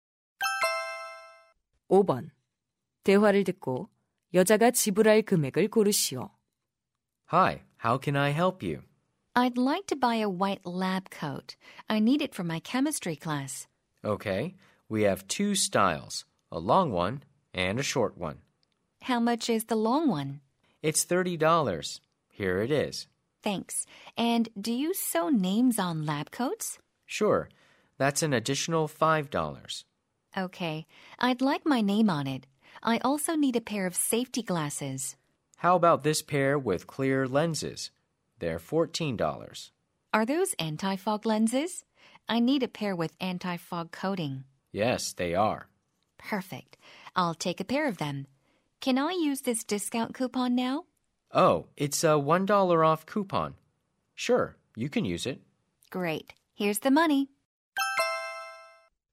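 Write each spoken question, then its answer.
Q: 대화를 듣고 여자가 지불할 금액을 고르시오.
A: $48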